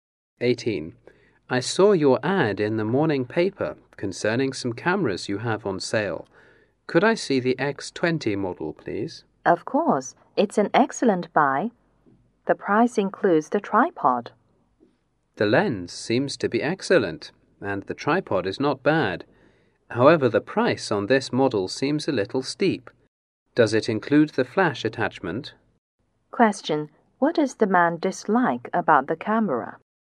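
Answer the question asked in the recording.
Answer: The price is too high.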